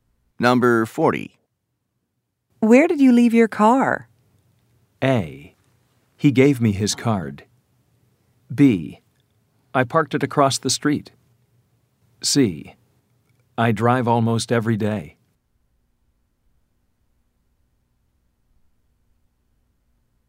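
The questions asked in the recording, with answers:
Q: Where did you leave your car?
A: B: I parked it across the street.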